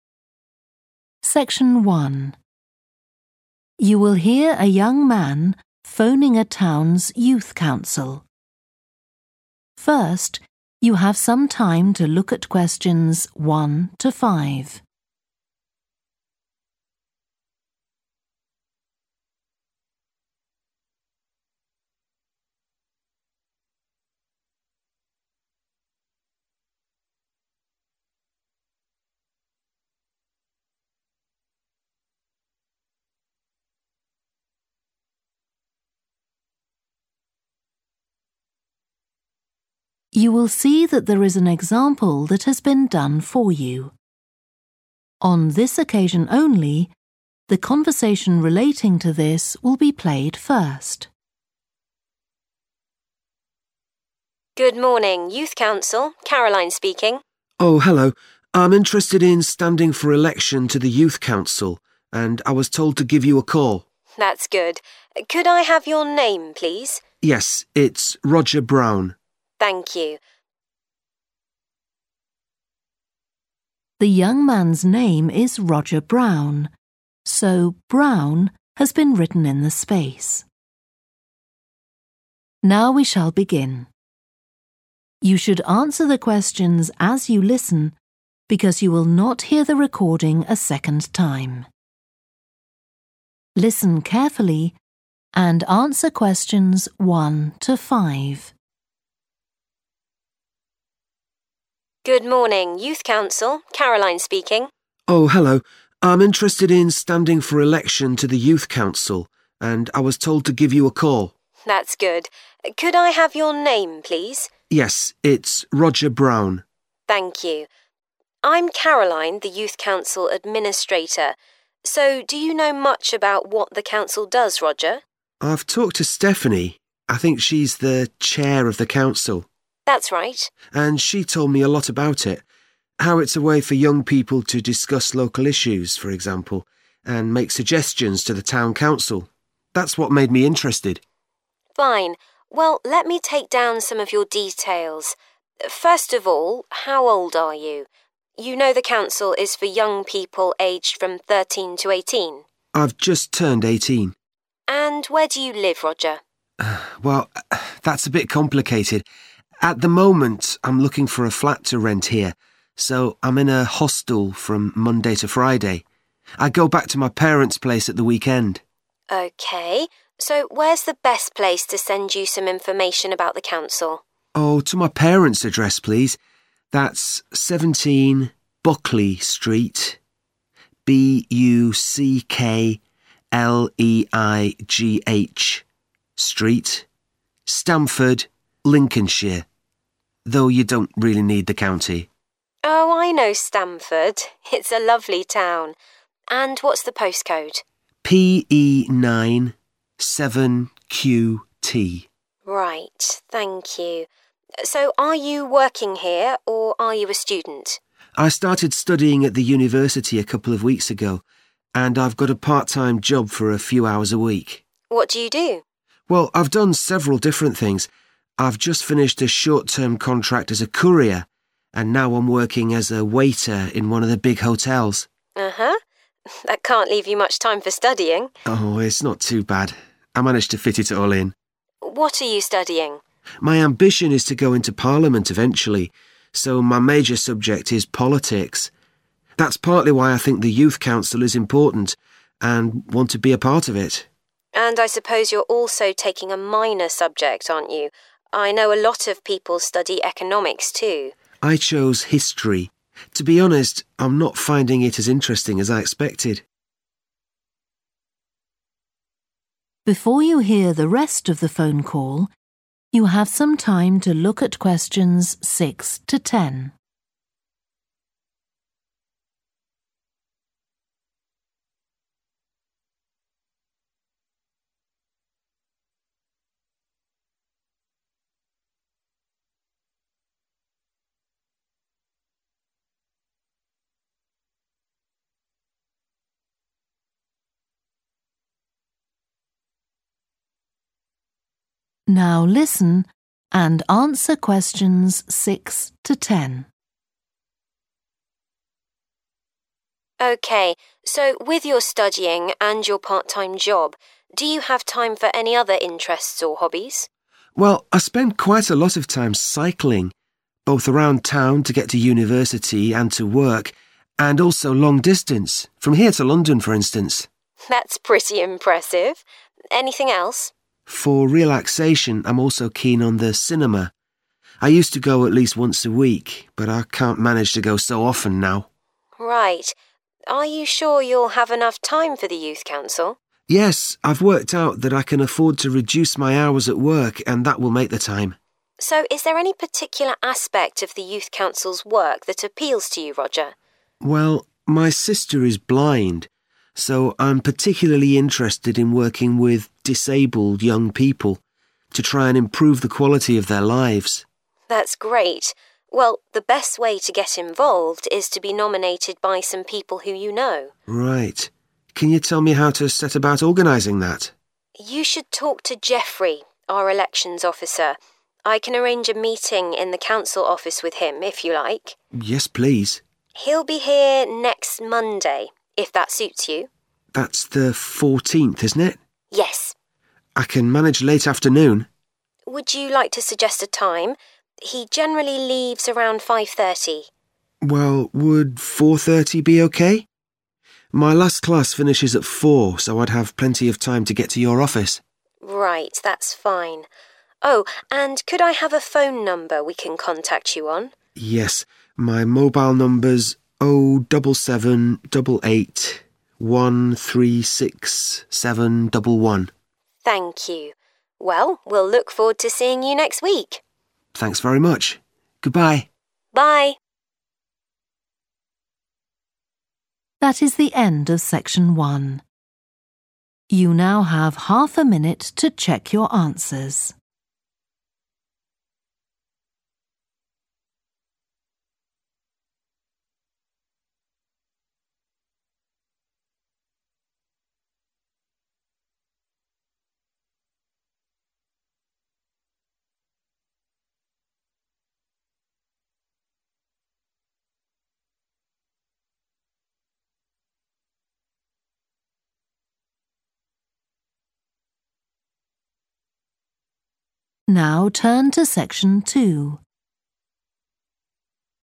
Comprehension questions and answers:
Complete the notes below. Write ONE WORD AND/OR A NUMBER for each answer.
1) Currently staying in a _____ during the week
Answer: hostel

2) Postal address: 17, _____ Street, Stamford, Lincs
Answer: Buckleigh

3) Postcode: _____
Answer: PE9 7QT

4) Occupation: student and part-time job as a _____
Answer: waiter

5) Studying _____ (major subject) and history (minor subject)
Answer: politics

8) On Youth Council, wants to work with young people who are _____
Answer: disabled

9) Will come to talk to the Elections Officer next Monday at _____ pm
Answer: 4:30 / 4.30 / half past four

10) Mobile number: _____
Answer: 07788 136711

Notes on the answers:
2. The correct answer is 'Buckleigh' because it fits perfectly in the context of completing the address details in the provided notes. The spelling 'B-U-C-K-L-E-I-G-H' matches the street name 'Buckleigh' mentioned in the excerpt.
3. The correct answer matches the format of a postal code and fits the context of providing the necessary information for mail delivery or postal correspondence.
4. The correct answer is 'waiter' because the transcript clearly states that the person is working as a waiter in one of the big hotels.
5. The correct answer is 'politics' because the excerpt clearly states that the individual's major subject of study is politics, demonstrating an interest in the workings of government and political processes.
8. The correct answer 'disabled' matches the context of the conversation where the person wants to work with disabled young people to make a positive impact in their lives.
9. The answer is correct because it directly corresponds to the time mentioned in the excerpt, which is 4.30 pm. 'Half past four' is the same as 4:30 on a clock, indicating the precise time for the meeting.
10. The correct answer matches the mobile number explicitly mentioned in the excerpt, confirming that it is the accurate contact number for the individual.

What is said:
CAROLINE: Good Morning. Youth Council. Caroline speaking.
ROGER: Oh, hello, I'm interested in standing for election to the Youth Council, and I was told to give you a call.
CAROLINE: That's good. Could you I have your name, please?
ROGER: Yes, it's Roger Brown.
CAROLINE: Thank you. I'm Caroline, the Youth Council administrator. So do you know much about what the Council does, Roger?
ROGER: I've talked to Stephanie – I think she's the chair of the Council.
CAROLINE: That's right.
ROGER: And she told me a lot about it. How it's a way for young people to discuss local issues, for example, and make suggestions to the town council. That's what made me interested.
CAROLINE: Fine. Well let me take down some of your details. First of all, how old are you? You know the Council is for young people aged from 13 to 18?
ROGER: I've just turned 18.
CAROLINE: And where do you live, Roger?
ROGER: Well, that's a bit complicated. At the moment I'm looking for a flat to rent here, so I'm in a hostel from Monday to Friday. I go back to my parents' place at the weekend.
CAROLINE: OK, so where's the best place to send you some information about the Council?
ROGER: Oh, to my parent's address, please. That's 17, Buckleigh Street – B-U-C-K-L-E-I-G-H Street, Stamford, Lincolnshire, though you don't really need the country.
CAROLINE: Oh, I know Stamford – it's a lovely town. And what's the postcode?
CAROLINE: Right, thank you. So are you working here, or are you a student?
ROGER: I started studying at the university a couple of weeks ago, and I've got a part-time job for a few hours a week.
CAROLINE: What do you do?
ROGER: Well, I've done several different things. I've just finished a short-term contract as a courier, and now I'm working as a waiter in one of the big hotels.
CAROLINE: Uhuh. That can't leave you much time for studying!
ROGER: Oh, it's not too bad. I manage to fit it all in.
CAROLINE: What are you studying?
ROGER: My ambition is to go into parliament eventually, so my major subject is politics. That's partly why I think the Youth Council is important and want to be a part of it.
CAROLINE: And I suppose you're also taking a minor subject, aren't you? I know a lot of people study economics too.
ROGER: I chose history. To be honest, I'm not finding it as interesting as I expected!
CAROLINE: OK, so with your studying and your part-time job, do you have time for any other interests or hobbies?
ROGER: Well, I spend quite a lot of time cycling – both around town to get to university and to work, and also long-distance, from here to London, for instance.
CAROLINE: That's pretty impressive! Anything else?
ROGER: For relaxation I'm also keen on the cinema – I used to go at least once a week, but I can't manage to go so often now.
CAROLINE: Right. Are you sure you'll have enough time for the Youth Council?
ROGER: Yes, I've worked out that I can afford to reduce my hours at work, and that will make the time.
CAROLINE: So is there any particular aspect of the Youth Council's work that appeals to you, Roger?
ROGER: Well, my sister is blind, so I'm particularly interested in working with disabled young people, to try and improve the quality of their lives.
CAROLINE: That's great. Well, the best way to get involved is to be nominated by some people who you know.
ROGER: Right. Can you tell me how to set about organising that?
CAROLINE: You should talk to Jeffrey, our Elections Officer. I can arrange a meeting in the council office with him, if you like.
ROGER: Yes, please.
CAROLINE: He'll be here next Monday, if that suits you
ROGER: That's the 14th, isn't it?
CAROLINE: Yes.
ROGER: I can manage late afternoon.
CAROLINE: Would you like to suggest a time? He generally leaves around 5.30.
ROGER: Well, would 4.30 be OK? My last class finishes at 4, so I'd have plenty of time to get to your office.
CAROLINE: Right, that's fine. Oh, and could I have a phone number we can contact you on?
ROGER: Yes, my mobile number's 07788 136711.
CAROLINE: Thank you. Well, we'll look forward to seeing you next week.
ROGER: Thanks very much. Goodbye.
CAROLINE: Bye.